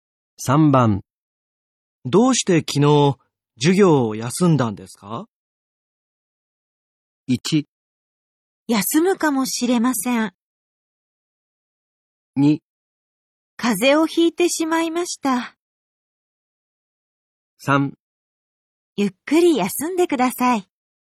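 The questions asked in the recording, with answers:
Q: どうして昨日授業を休んだんですか?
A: 2: 風邪をひいてしまいました。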